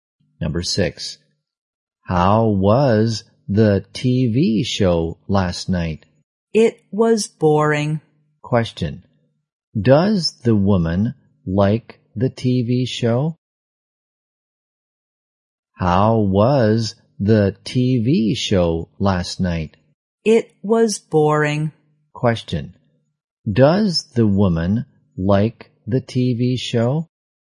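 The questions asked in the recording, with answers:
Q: does the woman like the TV show?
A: No, she thought it was boring.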